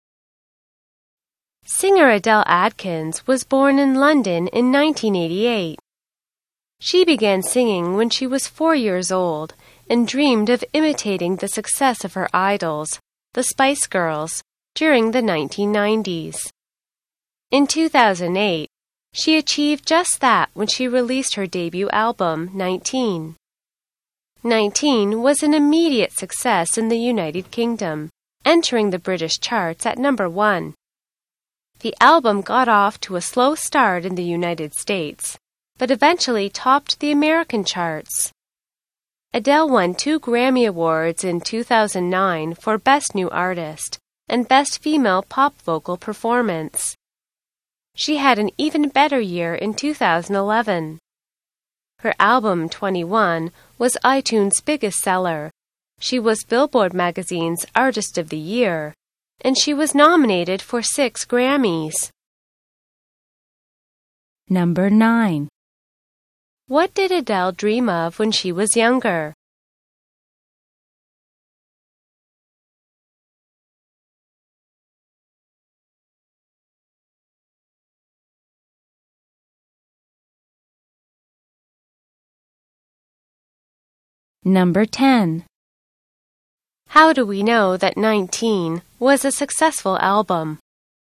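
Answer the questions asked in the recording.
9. Imitating the success of her idols, the Spice Girls.
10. It entered the British charts at number 1 and eventually topped the American charts.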